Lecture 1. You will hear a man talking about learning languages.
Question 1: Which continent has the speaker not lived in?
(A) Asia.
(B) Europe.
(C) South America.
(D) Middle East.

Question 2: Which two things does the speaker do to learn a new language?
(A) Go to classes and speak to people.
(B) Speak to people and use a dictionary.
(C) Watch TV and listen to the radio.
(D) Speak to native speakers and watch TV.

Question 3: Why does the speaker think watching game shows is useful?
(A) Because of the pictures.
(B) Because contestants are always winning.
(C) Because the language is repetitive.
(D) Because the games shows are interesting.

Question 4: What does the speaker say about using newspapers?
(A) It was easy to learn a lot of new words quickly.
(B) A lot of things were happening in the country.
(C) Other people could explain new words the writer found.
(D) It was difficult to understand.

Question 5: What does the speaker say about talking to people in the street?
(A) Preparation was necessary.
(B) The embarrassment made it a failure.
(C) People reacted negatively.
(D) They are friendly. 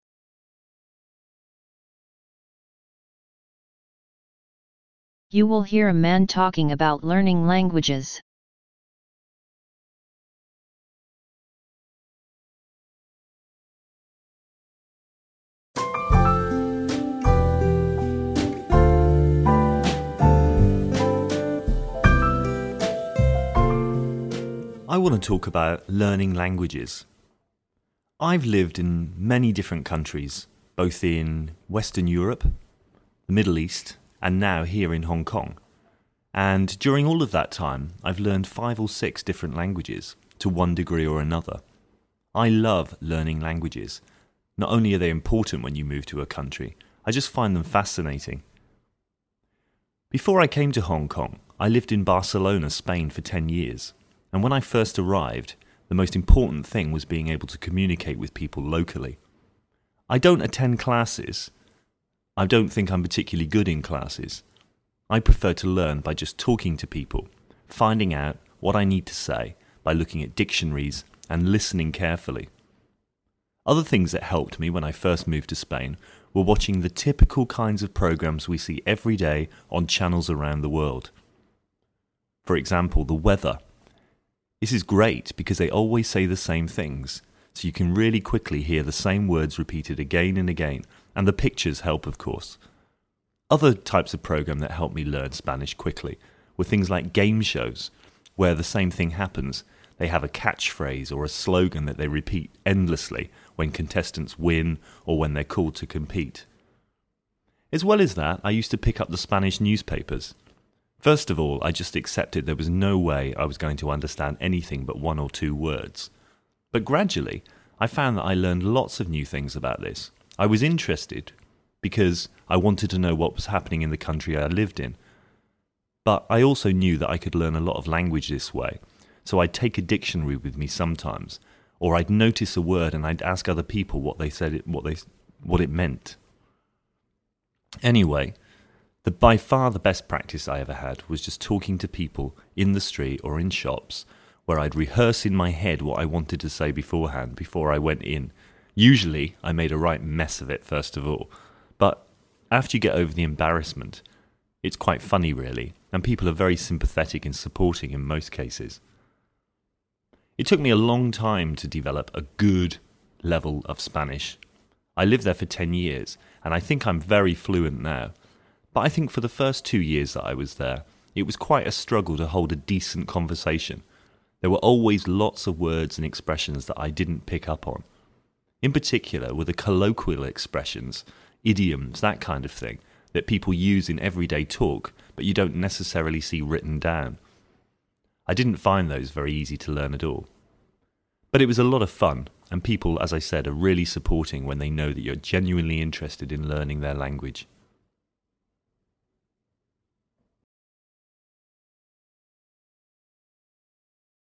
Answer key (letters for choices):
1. C
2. B
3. C
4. D
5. D

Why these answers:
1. Thông tin: I've lived in many different countries, both in Western Europe, the Middle East, and now here in Hong Kong, (Tôi đã sống ở nhiều quốc gia khác nhau, cả ở Tây Âu, Trung Đông và hiện tại ở Hồng Kông.)
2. (Tôi thích học bằng cách nói chuyện với mọi người, tìm hiểu những gì mình cần nói bằng cách tra từ điển và lắng nghe cẩn thận.)
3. Thông tin: Other types of programs that helped me learn Spanish quickly were things like game shows, where the same thing happens: they have catchphrases or slogans that they repeat endlessly when contestants win or are called to compete. (Các loại chương trình khác giúp tôi học tiếng Tây Ban Nha nhanh chóng là những chương trình như trò chơi truyền hình, nơi điều tương tự xảy ra: chúng có những câu khẩu hiệu hoặc câu nói cửa miệng được lặp đi lặp lại không ngừng khi người chơi thắng hoặc được gọi lên thi đấu.)
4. (Ban đầu, tôi chỉ chấp nhận rằng mình sẽ không thể hiểu được gì ngoài một hoặc hai từ, nhưng dần dần tôi nhận ra mình đã học được rất nhiều điều mới.)
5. Thông tin: I made a mess of it at first, but after you get over the embarrassment, it's quite funny really, and people are very sympathetic and supportive in most cases. (Ban đầu tôi làm hỏng hết mọi chuyện, nhưng sau khi vượt qua sự xấu hổ, thực ra nó khá buồn cười, và trong hầu hết các trường hợp, mọi người đều rất thông cảm và ủng hộ.)

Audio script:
I want to talk about learning languages. I've lived in many different countries, both in Western Europe, the Middle East, and now here in Hong Kong, and during all of that time, I've learned five or six different languages to one degree or another. I love learning languages. Not only are they important when you move to a country, I just find them fascinating.
Before I came to Hong Kong, I lived in Barcelona, Spain for 10 years, and when I first arrived, the most important thing was being able to communicate with people locally. I don't attend classes because I don't think I'm particularly good in classes. I prefer to learn by just talking to people, finding out what I need to say by looking at dictionaries and listening carefully. Other things that helped me when I first moved to Spain were watching typical programs we see every day on channels around the world, for example, the weather. This is great because they always say the same things, so you can quickly hear the same words repeated again and again, and the pictures help, of course.
Other types of programs that helped me learn Spanish quickly were things like game shows, where the same thing happens: they have catchphrases or slogans that they repeat endlessly when contestants win or are called to compete. As well as that, I used to pick up Spanish newspapers. At first, I just accepted there was no way I was going to understand anything but one or two words, but gradually I found that I learned lots of new things. I was interested because I wanted to know what was happening in the country I lived in, but I also knew that I could learn a lot of language this way, so I'd take a dictionary with me sometimes or notice a word and ask other people what it meant.
Anyway, by far the best practice I ever had was just talking to people in the street or in shops, where I'd rehearse in my head what I wanted to say beforehand. Usually, I made a mess of it at first, but after you get over the embarrassment, it's quite funny really, and people are very sympathetic and supportive in most cases. It took me a long time to develop a good level of Spanish. I lived there for 10 years, and I think I'm very fluent now, but for the first two years, it was quite a struggle to hold a decent conversation. There were always lots of words and expressions that I didn't pick up on, particularly colloquial expressions and idioms that people use in everyday talk but you don't necessarily see written down. I didn't find those very easy to learn at all, but it was a lot of fun, and people, as I said, are really supportive when they know that you're genuinely interested in learning their language.

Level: Vận dụng